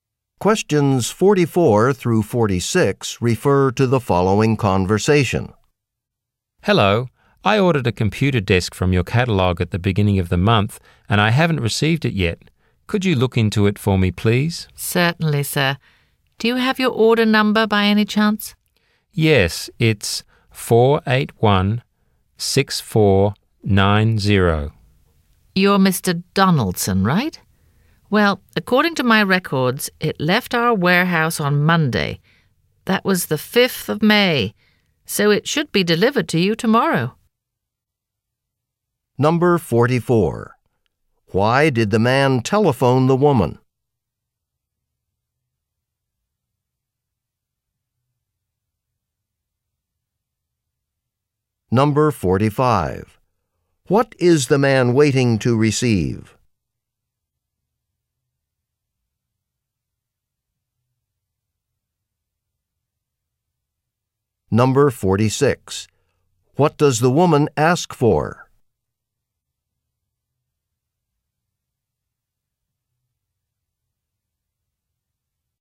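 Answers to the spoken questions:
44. To check on an order he hasn't received
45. A computer desk
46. His order number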